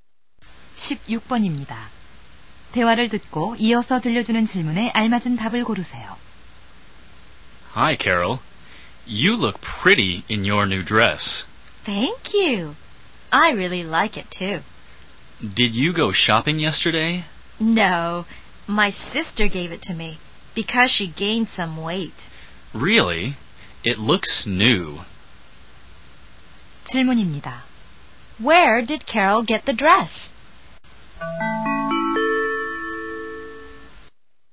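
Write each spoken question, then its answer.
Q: Where did Carol get the dress?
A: From her sister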